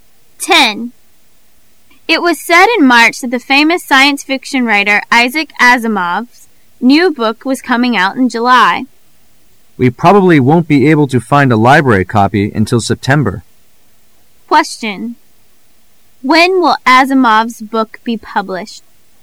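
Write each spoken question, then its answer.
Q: When will Asimov's book be published?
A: In July

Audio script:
A
[解析] W: It was said in March that the famous science fiction writer Isaac Asimov's new book was coming out in July. M: We probably won't be able to find a library copy until September. Q: When will Asimov's book be published?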